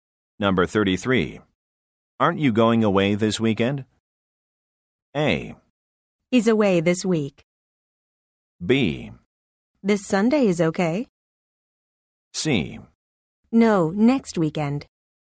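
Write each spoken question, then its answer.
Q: Aren't you going away this weekend?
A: C: No, next weekend.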